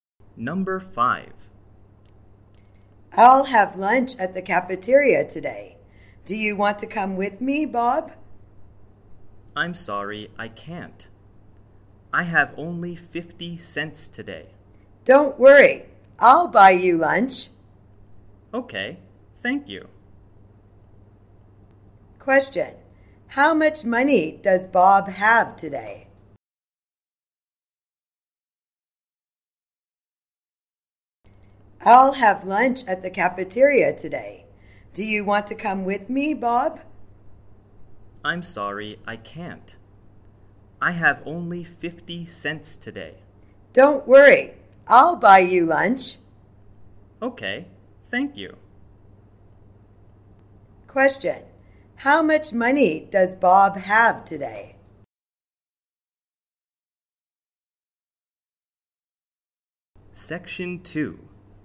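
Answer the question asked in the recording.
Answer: 50 cents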